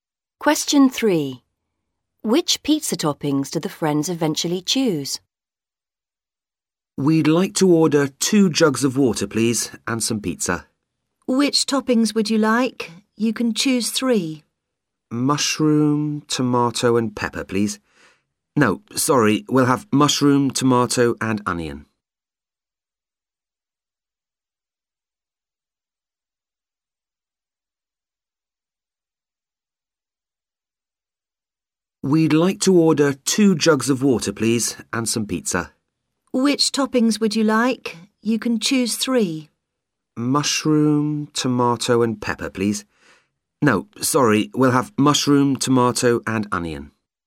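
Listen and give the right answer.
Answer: Mushroom, tomato and onion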